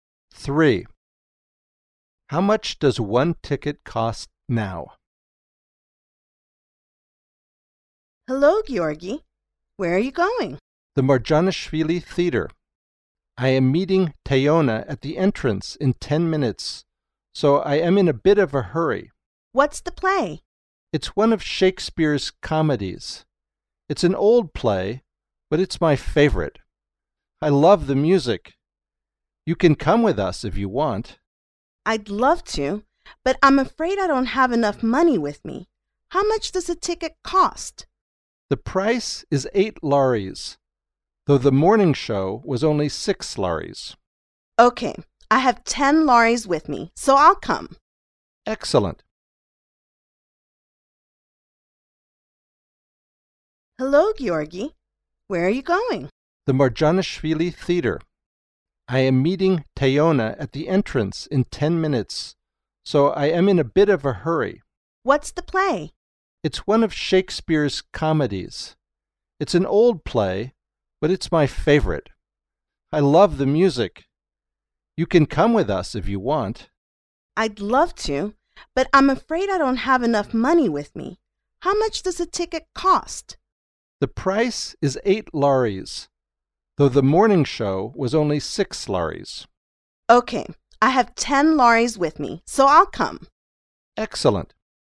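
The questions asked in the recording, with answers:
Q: How much does one ticket cost now?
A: 8 lari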